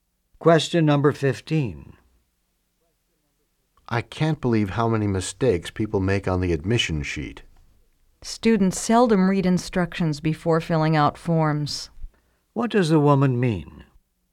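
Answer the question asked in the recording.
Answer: Students make mistakes because they don't read the instructions.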